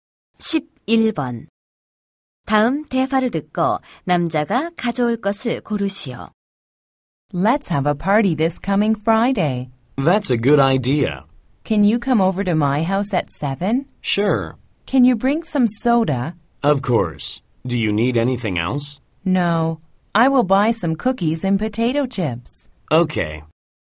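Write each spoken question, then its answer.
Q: 다음 대화를 듣고 남자가 가져올 것을 고르시오.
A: 탄산음료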